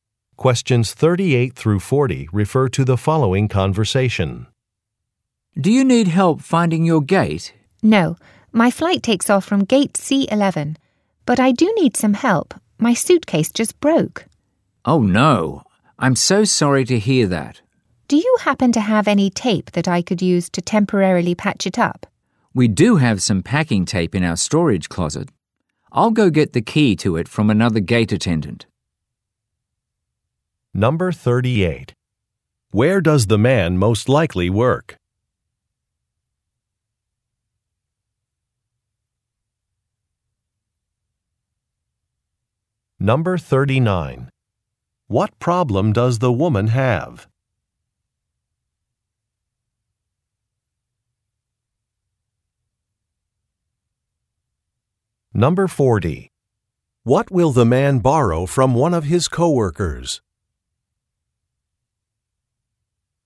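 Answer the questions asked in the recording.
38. At an airport
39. Her suitcase broke
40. A key to the storage closet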